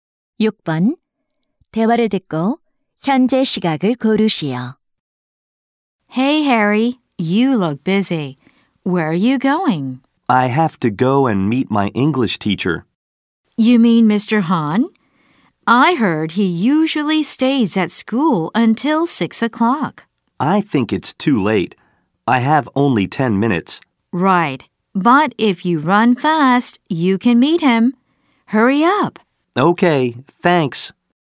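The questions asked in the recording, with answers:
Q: 대화를 듣고 현재 시각을 고르시오.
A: 5시 50분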